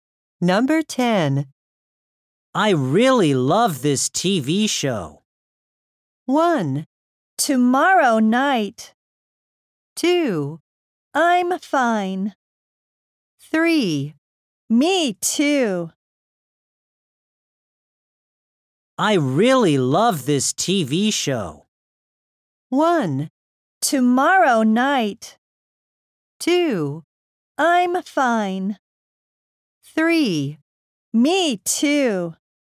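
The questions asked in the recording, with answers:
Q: I really love this TV show.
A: 3: Me too.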